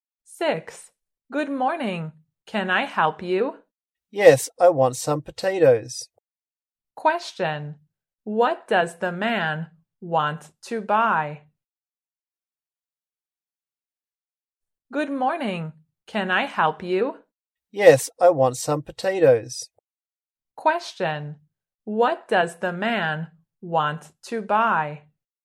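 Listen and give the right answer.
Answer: Some potatoes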